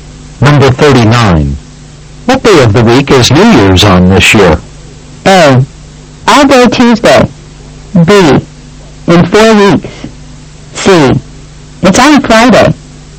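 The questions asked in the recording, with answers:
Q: What day of the week is New Year's on this year?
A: C: It's on Friday.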